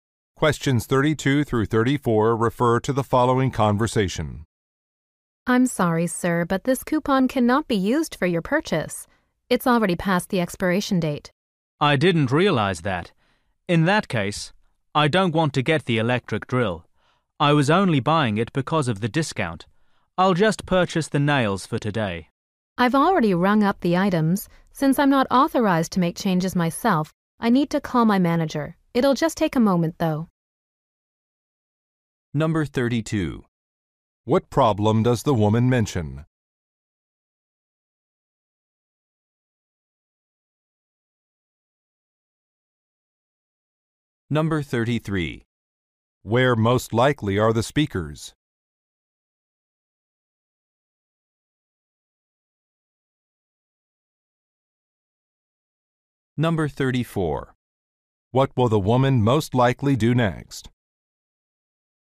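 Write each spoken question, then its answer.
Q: What problem does the woman mention?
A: The coupon has expired

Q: Where most likely are the speakers?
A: At a hardware store

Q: What will the woman most likely do next?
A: Call her manager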